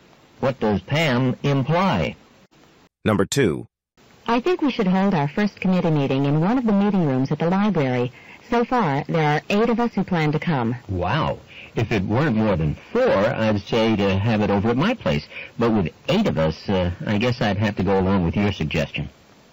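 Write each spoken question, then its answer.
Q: What does the man imply?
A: He agrees to hold the meeting at the library.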